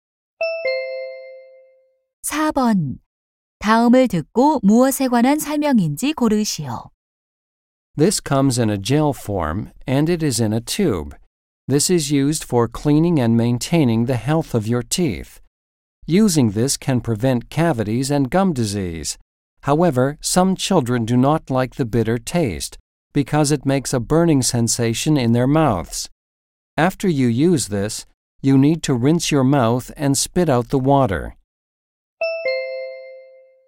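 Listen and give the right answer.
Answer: 치약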